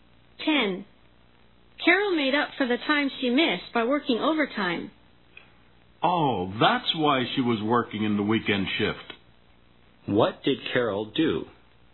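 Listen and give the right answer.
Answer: She worked overtime (the weekend shift) to make up for missed time.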